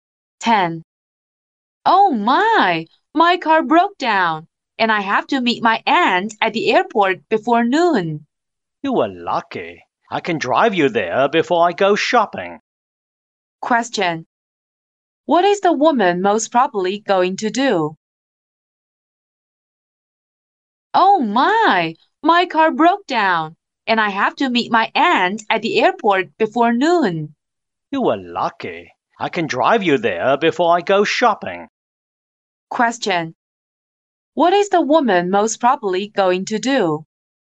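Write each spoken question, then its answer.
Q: What is the woman most probably going to do?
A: Drive the man to the airport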